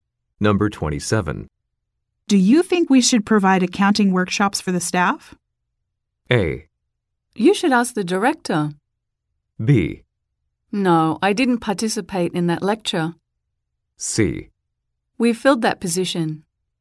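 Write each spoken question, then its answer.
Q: Do you think we should provide accounting workshops for the staff?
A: A: You should ask the director.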